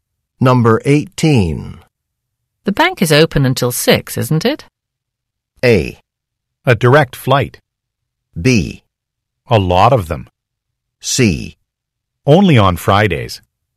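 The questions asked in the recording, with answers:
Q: The bank is open until 6, isn't it?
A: C: Only on Fridays.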